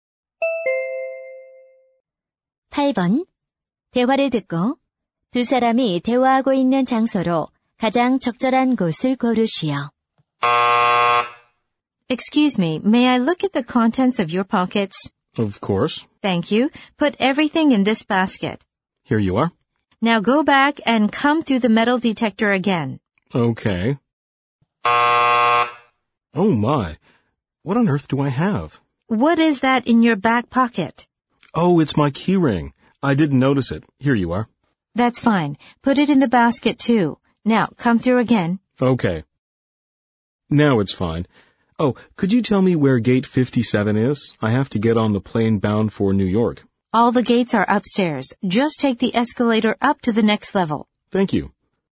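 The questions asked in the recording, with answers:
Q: 대화를 듣고 두 사람이 대화하고 있는 장소로 가장 적절한 곳을 고르시오.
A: 공항 보안 검색대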